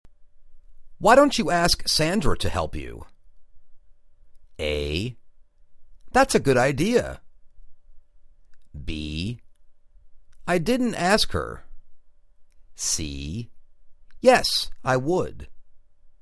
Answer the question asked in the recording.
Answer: That's a good idea